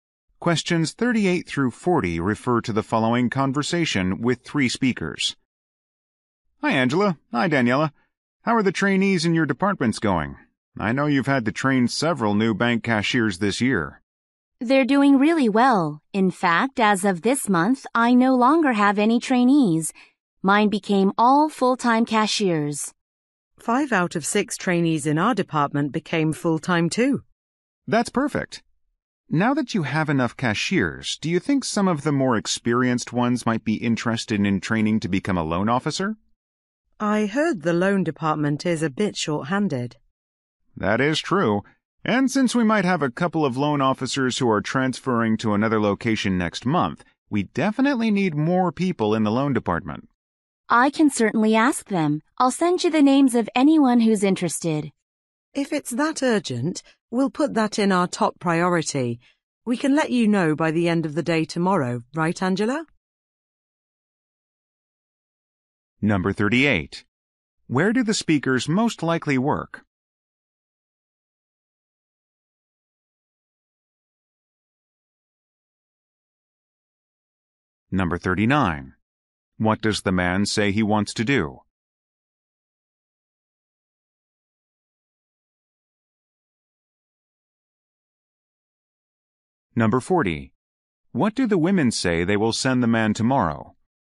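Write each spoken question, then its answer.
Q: Where do the speakers most likely work?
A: At a bank

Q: What does the man say he wants to do?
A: Train experienced cashiers as loan officers

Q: What do the women say they will send the man tomorrow?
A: Names of interested cashiers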